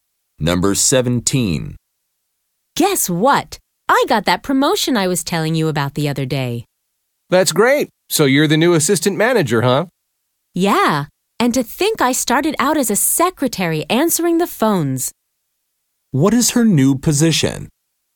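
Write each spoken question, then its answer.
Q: What is her new position?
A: Assistant manager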